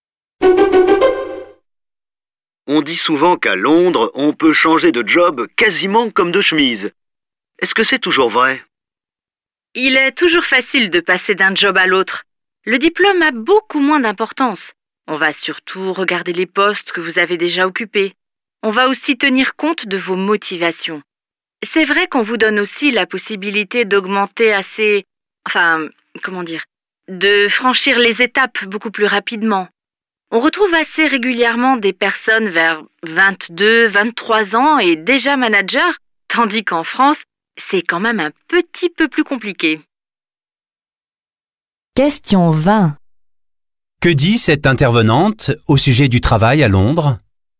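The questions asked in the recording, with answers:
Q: Que dit cette intervenante au sujet du travail à Londres?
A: Il est facile de changer de job et d'évoluer vite; l'expérience compte plus que le diplôme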